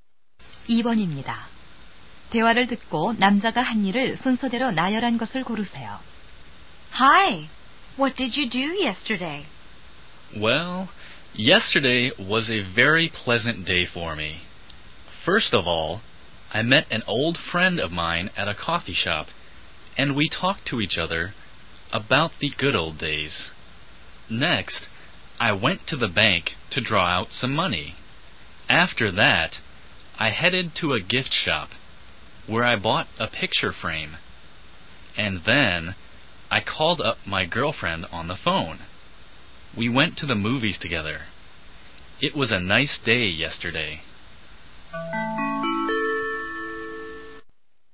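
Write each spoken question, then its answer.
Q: 대화를 듣고 남자가 한 일을 순서대로 나열한 것을 고르세요.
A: 친구 만남 → 은행 → 액자 구입 → 여자친구에게 전화 → 영화 관람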